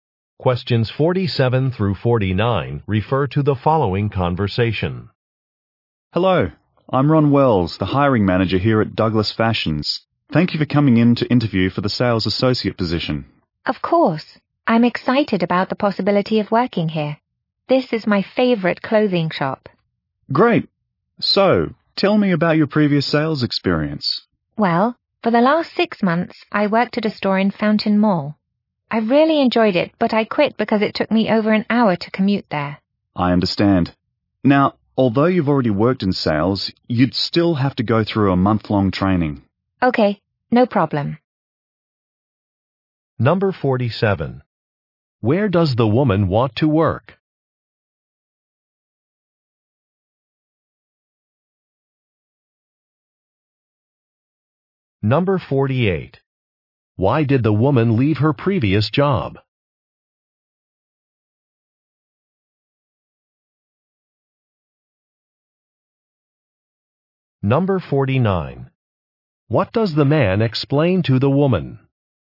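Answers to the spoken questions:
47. At a clothing store
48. The commute was too long
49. She would need to complete a month-long training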